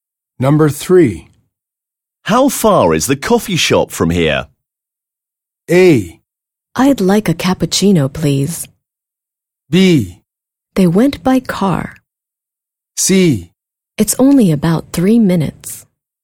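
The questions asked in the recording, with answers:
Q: How far is the coffee shop from here?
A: C: It's only about 3 minutes.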